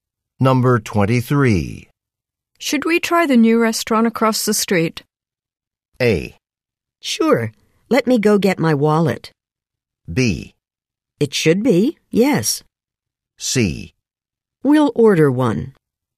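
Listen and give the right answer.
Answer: A: Sure. Let me go get my wallet.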